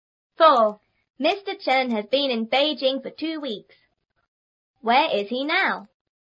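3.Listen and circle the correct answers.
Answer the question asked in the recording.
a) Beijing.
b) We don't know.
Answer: a) Beijing.

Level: 初中英语广州版3B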